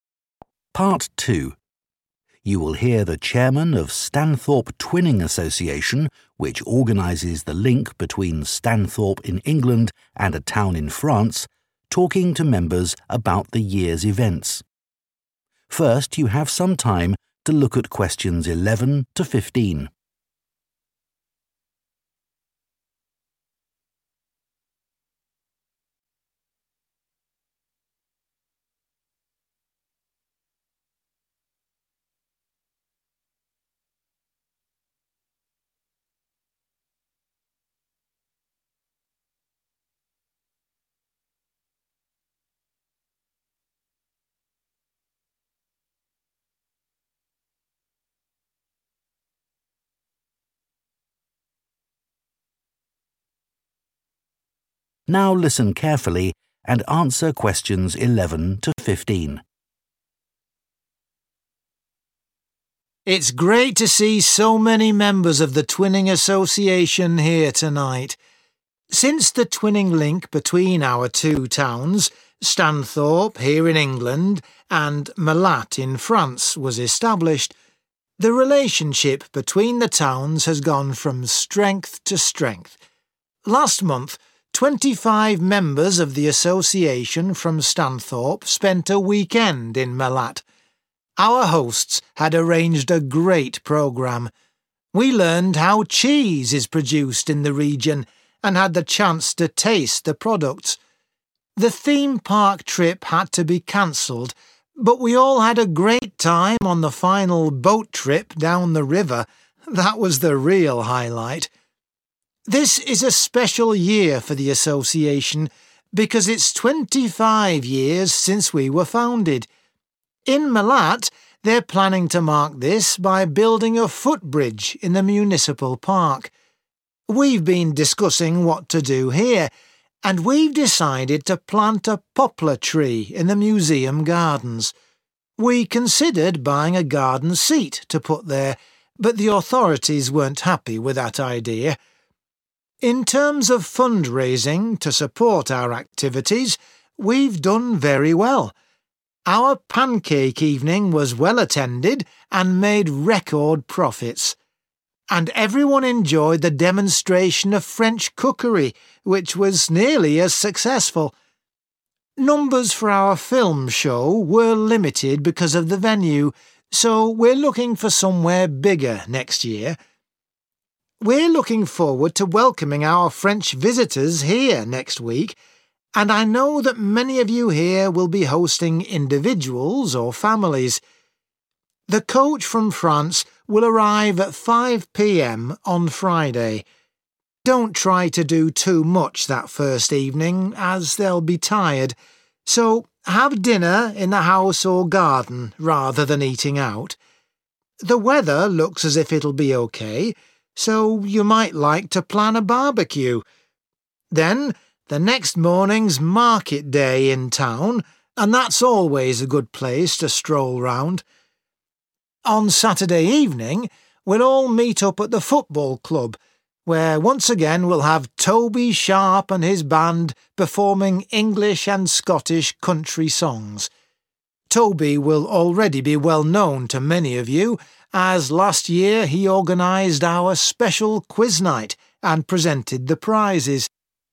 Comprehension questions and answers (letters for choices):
Choose the correct letter, A, B or C.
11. During the visit to Malatte, in France, members especially enjoyed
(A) going to a theme park.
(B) experiencing a river trip.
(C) visiting a cheese factory.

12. What will happen in Stanthorpe to mark the 25th anniversary of the Twinning Association?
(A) A tree will be planted.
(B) A garden seat will be bought.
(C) A footbridge will be built.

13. Which event raised most funds this year?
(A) the film show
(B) the pancake evening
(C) the cookery demonstration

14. For the first evening with the French visitors host families are advised to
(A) take them for a walk round the town.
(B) go to a local restaurant.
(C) have a meal at home.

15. On Saturday evening there will be the chance to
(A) listen to a concert.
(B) watch a match.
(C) take part in a competition.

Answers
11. B
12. A
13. B
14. C
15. A